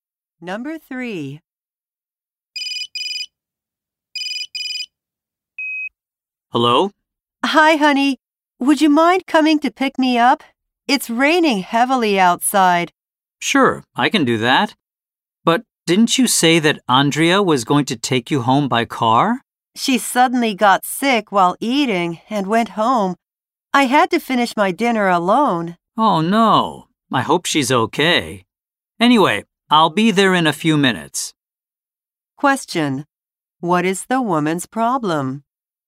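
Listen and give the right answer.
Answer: She has no ride home because Andrea got sick and left.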